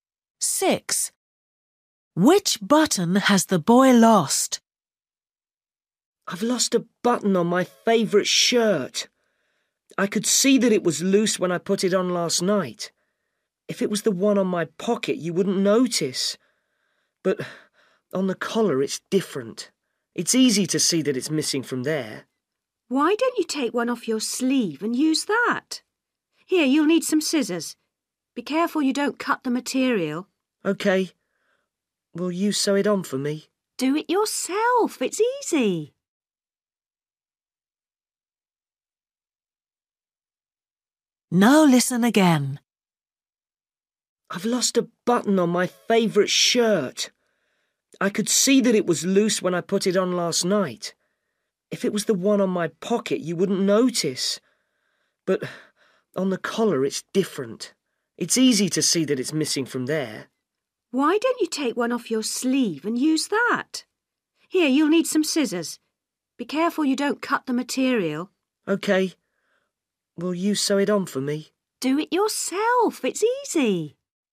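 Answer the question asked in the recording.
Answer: the one on the collar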